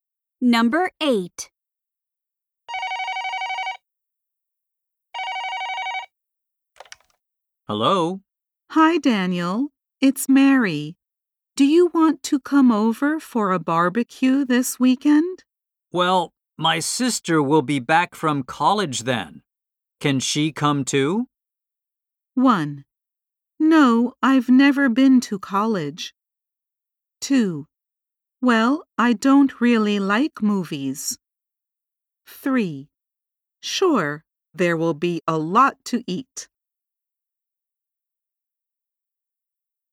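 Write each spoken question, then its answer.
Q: Can she come too?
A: 3: Sure, there will be a lot to eat.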